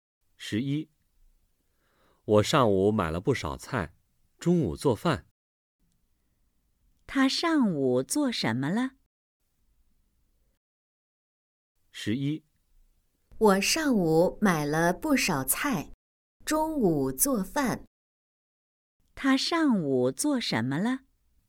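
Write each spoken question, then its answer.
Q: 他上午做什么了?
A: 买了不少菜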